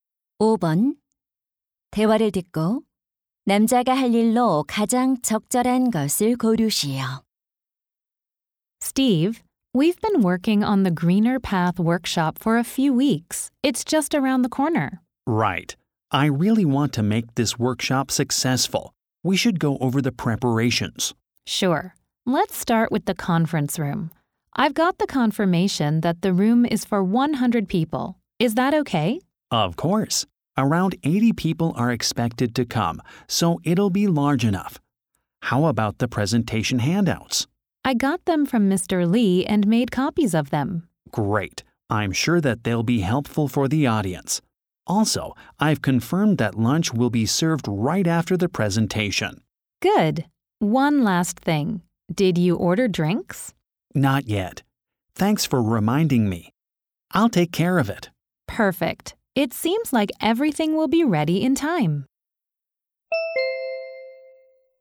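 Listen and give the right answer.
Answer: 음료 주문하기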